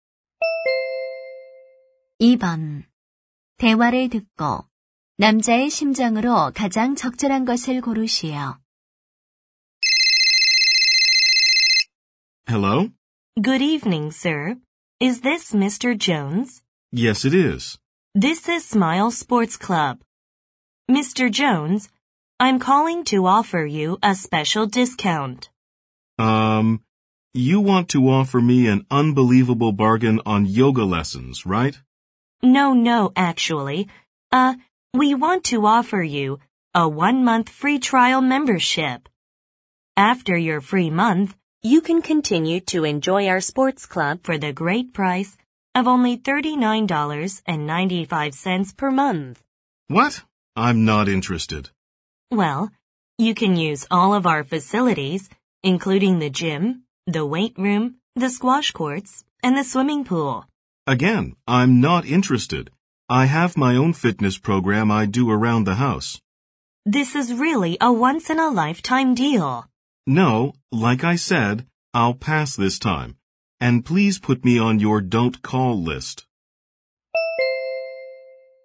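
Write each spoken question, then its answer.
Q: 대화를 듣고 남자의 심정으로 가장 적절한 것을 고르시오.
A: 짜증남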